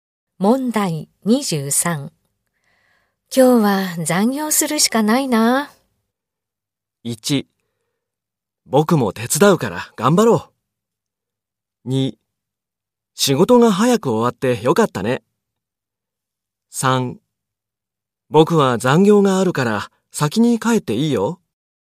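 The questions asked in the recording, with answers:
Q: 今日は残業するしかないな。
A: 1: 僕も手伝うから頑張ろう。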